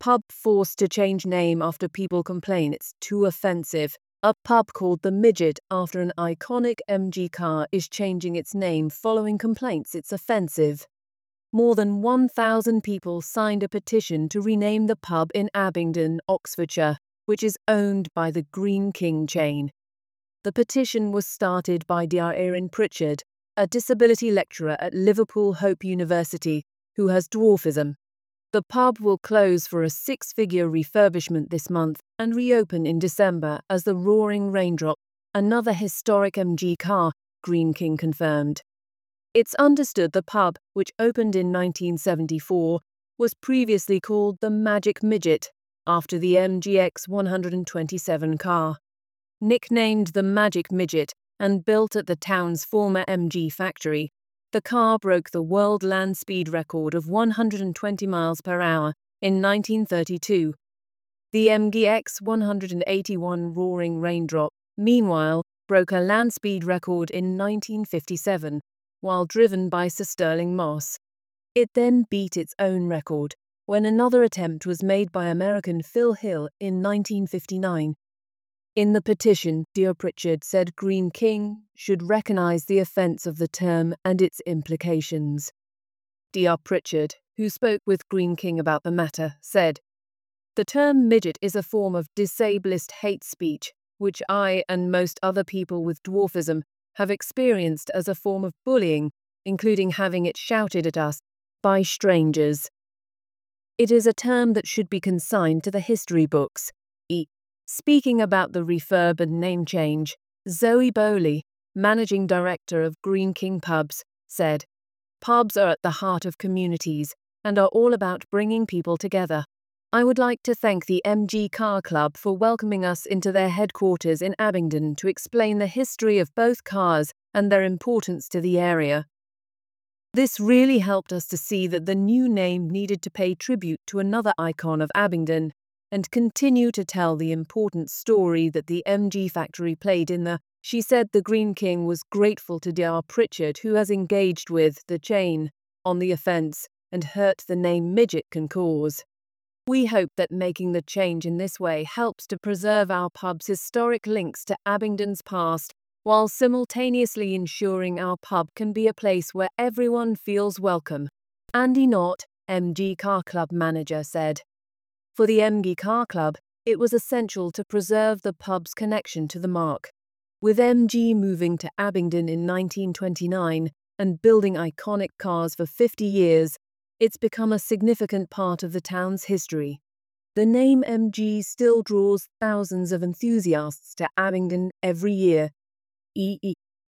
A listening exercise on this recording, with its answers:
Decide if the statements are true or false.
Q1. The pub's original name was inspired by a famous MG car.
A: True

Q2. The petition to change the pub's name was started by a local resident.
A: False

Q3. The pub will be renamed after a car that set a speed record in the 1950s.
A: True

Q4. Dr Pritchard believes the term 'midget' is acceptable in modern language.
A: False

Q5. Greene King plans to maintain the pub's historical connection to the MG brand.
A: True

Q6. The MG Car Club was against changing the pub's name.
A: False

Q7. The pub is located in Liverpool, where Dr Pritchard works.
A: False

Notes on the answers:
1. The text states the pub was named after an iconic MG car.
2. The petition was started by Dr Erin Pritchard, who is not mentioned as a local resident.
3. The new name, Roaring Raindrop, is after a car that set a speed record in the 1950s.
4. Dr Pritchard considers the term 'midget' to be offensive and a form of hate speech.
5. Greene King wants to preserve the pub's historic links to the MG brand.
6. The MG Car Club wanted to preserve the pub's connection to the MG marque.
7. The pub is located in Abingdon, not Liverpool.

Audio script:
Pub forced to change name after people complain it's too offensive. A pub called The Midget after an iconic MG car is changing its name following complaints it's offensive.
More than 1,000 people signed a petition to rename the pub in Abingdon, Oxfordshire, which is owned by the Greene King chain. The petition was started by Dr Erin Pritchard, a disability lecturer at Liverpool Hope University, who has dwarfism.
The pub will close for a 'six-figure' refurbishment this month and reopen in December as the Roaring Raindrop, another historic MG car, Greene King confirmed. It's understood the pub, which opened in 1974, was previously called The Magic Midget, after the MG EX 127 car.
Nicknamed the Magic Midget and built at the town's former MG factory, the car broke the world land speed record of 120mph in 1932. The MG EX 181 Roaring Raindrop, meanwhile, broke a land speed record in 1957, while driven by Sir Stirling Moss. It then beat its own record, when another attempt was made by American Phil Hill in 1959.
In the petition, Dr Pritchard said Greene King 'should recognise the offence of the term and its implications'.
Dr Pritchard, who spoke with Greene King about the matter, said: 'The term midget is a form of disablist hate speech, which I and most other people with dwarfism, have experienced as a form of bullying, including having it shouted at us by strangers.
'It is a term that should be consigned to the history books.'
Speaking about the refurb and name change, Zoe Bowley, managing director of Greene King pubs, said: 'Pubs are at the heart of communities and are all about bringing people together. I would like to thank the MG Car Club for welcoming us into their headquarters in Abingdon to explain the history of both cars and their importance to the area. This really helped us to see that the new name needed to pay tribute to another icon of Abingdon and continue to tell the important story that the MG factory played in the town.
She said the Greene King was grateful to Dr Pritchard 'who has engaged with (the chain) on the offence and hurt the name 'Midget' can cause.
'We hope that making the change in this way helps to preserve our pub's historic links to Abingdon's past while simultaneously ensuring our pub can be a place where everyone feels welcome.'
Andy Knott, MG Car Club manager, said: 'For the MG Car Club, it was essential to preserve the pub's connection to the marque.
'With MG moving to Abingdon in 1929 and building iconic cars for 50 years, it's become a significant part of the town's history. The name MG still draws thousands of enthusiasts to Abingdon every year.'